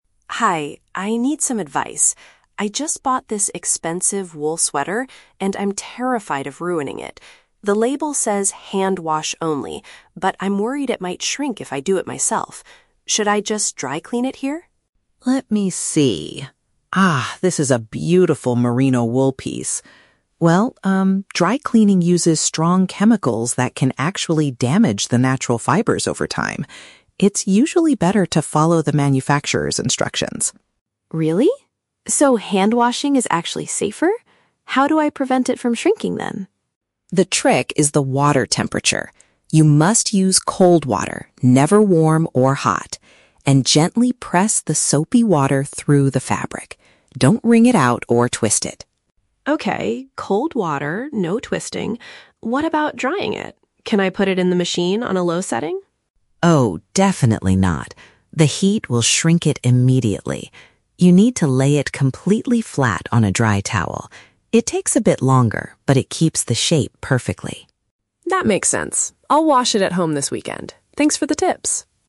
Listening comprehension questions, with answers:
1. Why does the cleaner advise against dry cleaning the sweater?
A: It relies on strong substances that can ruin the material.

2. What is the cleaner's instruction for washing the sweater?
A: Wash it with cold water and avoid twisting the fabric.

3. How should the customer dry the sweater?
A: Place it horizontally on top of a towel.

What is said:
Customer: Hi, I need some advice. I just bought this expensive wool sweater, and I'm terrified of ruining it. The label says "hand wash only," but I'm worried it might shrink if I do it myself. Should I just dry clean it here?
Cleaner: Let me see. Ah, this is a beautiful merino wool piece. Well, um, dry cleaning uses strong chemicals that can actually damage the natural fibers over time. It's usually better to follow the manufacturer's instructions.
Customer: Really? So hand washing is actually safer? How do I prevent it from shrinking, then?
Cleaner: The trick is the water temperature. You must use cold water, never warm or hot. And gently press the soapy water through the fabric. Don't wring it out or twist it.
Customer: Okay, cold water, no twisting. What about drying it? Can I put it in the machine on a low setting?
Cleaner: Oh, definitely not. The heat will shrink it immediately. You need to lay it completely flat on a dry towel. It takes a bit longer, but it keeps the shape perfectly.